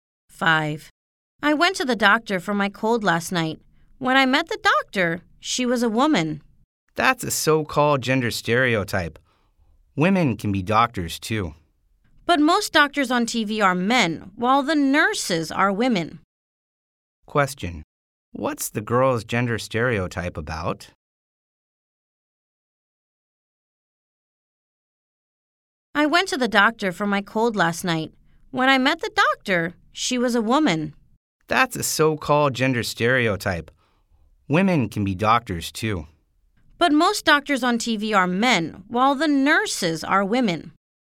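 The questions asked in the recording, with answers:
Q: What's the girl's gender stereotype about?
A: That doctors are men (and nurses are women)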